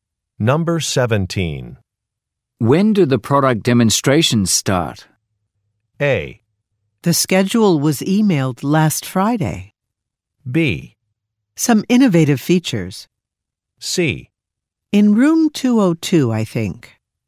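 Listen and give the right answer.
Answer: A: The schedule was emailed last Friday.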